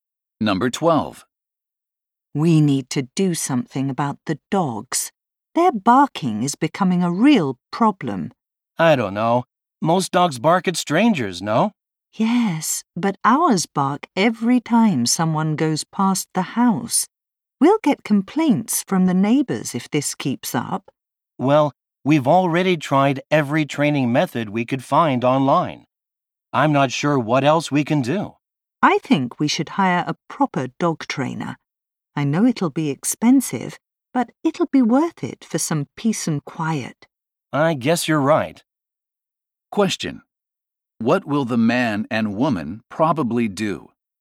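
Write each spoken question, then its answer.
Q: What will the man and woman probably do?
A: Hire a professional dog trainer.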